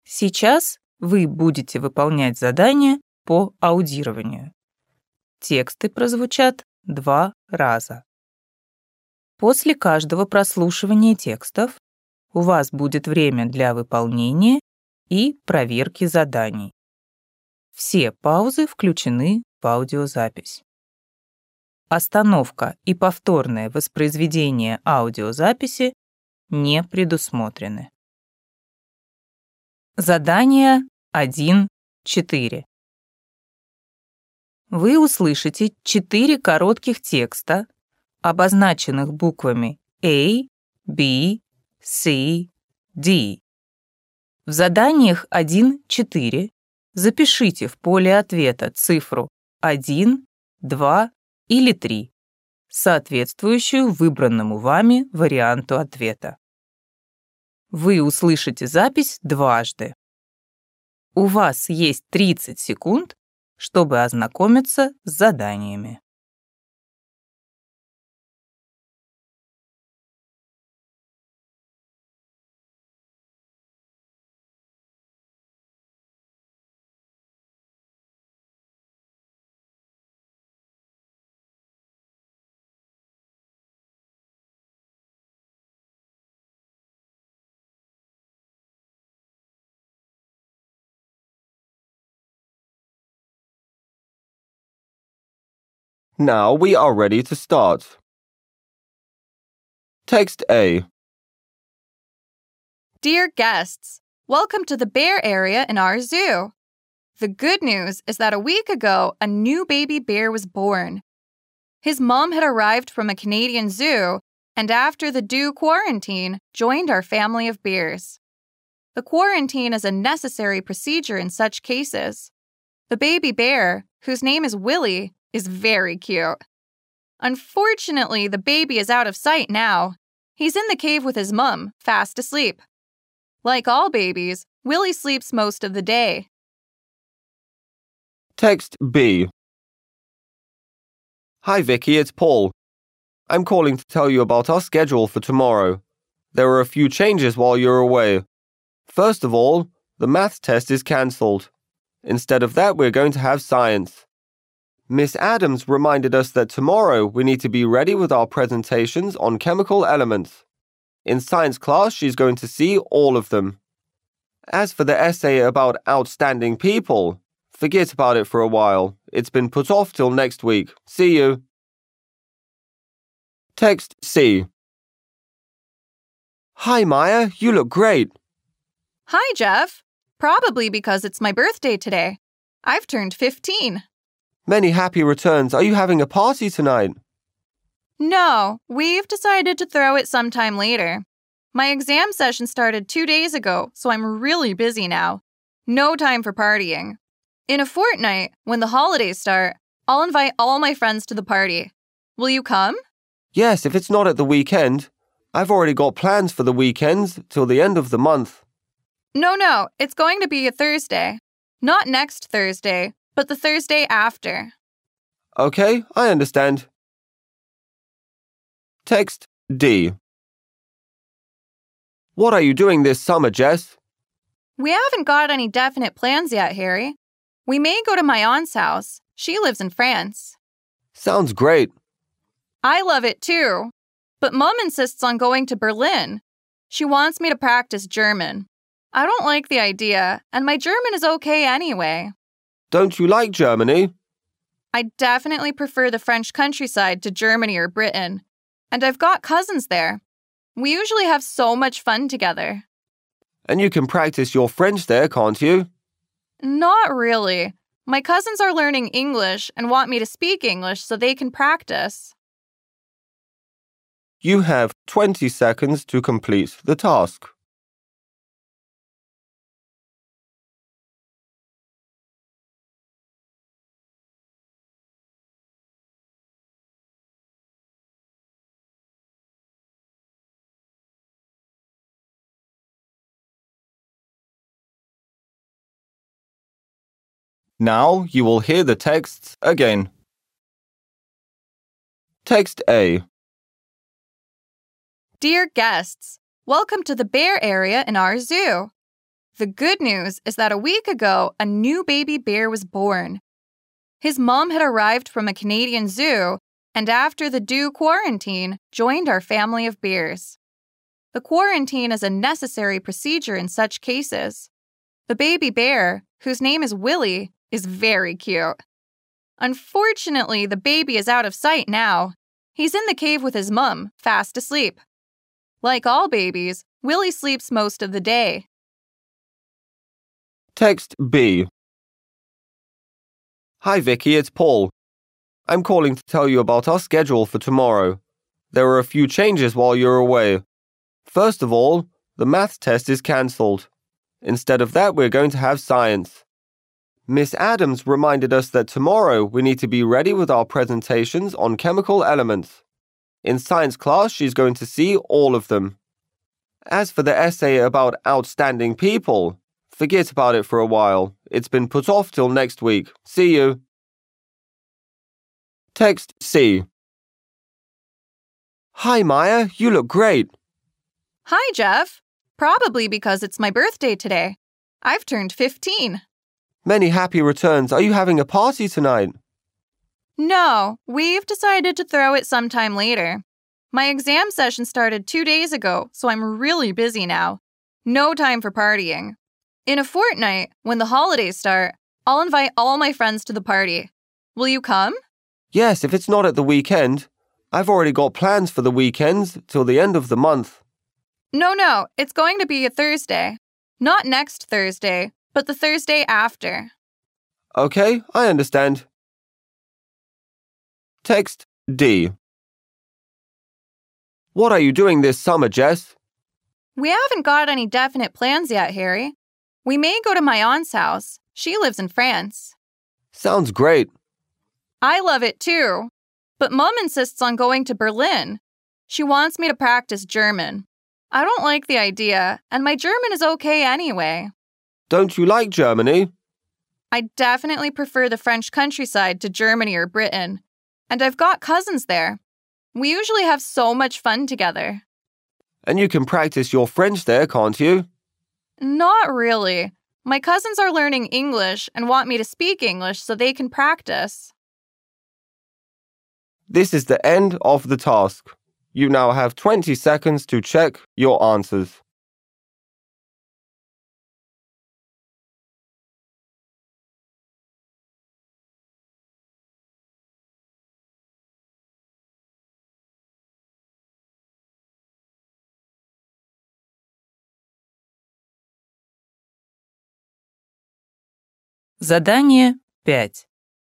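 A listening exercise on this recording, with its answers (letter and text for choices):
Вы услышите четыре коротких текста, обозначенных буквами А, B, C, D.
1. The visitors of the zoo cannot see the small bear at the moment because ...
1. it is in quarantine.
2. it is sleeping.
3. it has moved to another zoo.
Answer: 2. it is sleeping.

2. Tomorrow Vicky should ...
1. be well-prepared for her Maths test.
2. present her work in the Science class.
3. submit an essay on a scientist of the past.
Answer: 2. present her work in the Science class.

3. When is Mia going to have her birthday party?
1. In two weeks.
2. Next Saturday.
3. Tonight.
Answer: 1. In two weeks.

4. What would Jess like to do this summer?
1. Improve her German in Germany.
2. Invite her cousins to Britain.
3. Visit her aunt in France.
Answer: 3. Visit her aunt in France.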